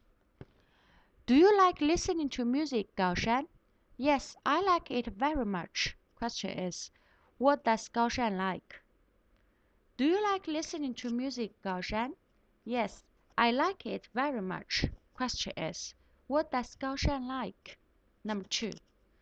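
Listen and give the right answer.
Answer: Listening to music.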